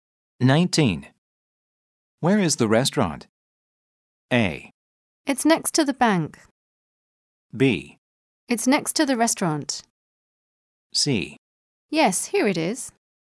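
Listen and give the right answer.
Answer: A: It's next to the bank.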